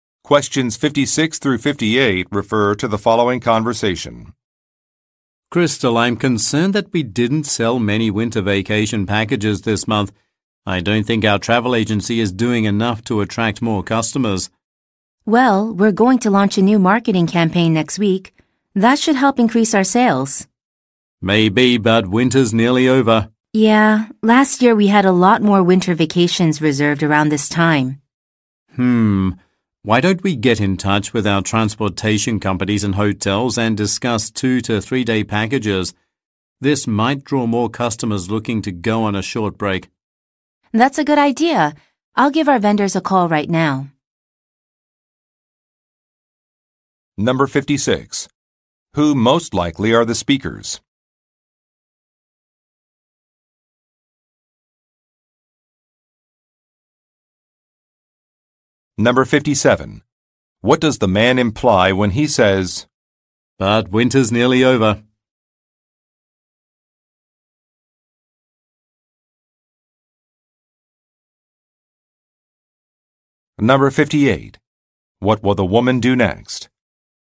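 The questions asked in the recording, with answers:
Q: Who most likely are the speakers?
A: Travel agents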